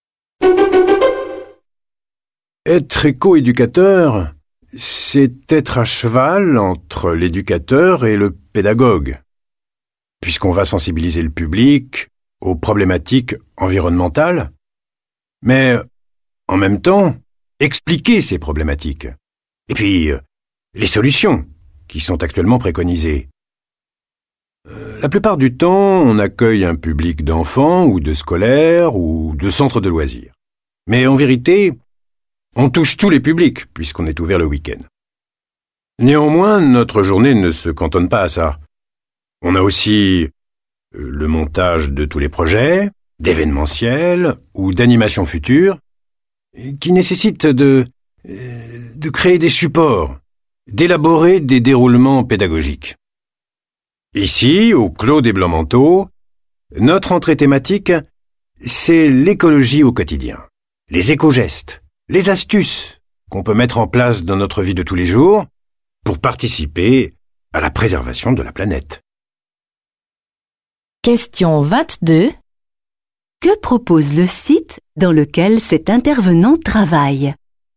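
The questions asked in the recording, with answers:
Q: Que propose le site dans lequel cet intervenant travaille?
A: Apprendre l'écologie au quotidien, les éco-gestes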